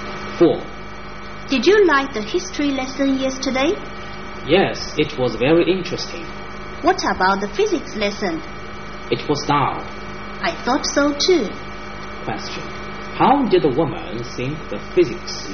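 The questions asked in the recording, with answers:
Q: How did the woman think the physics lesson?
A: Dull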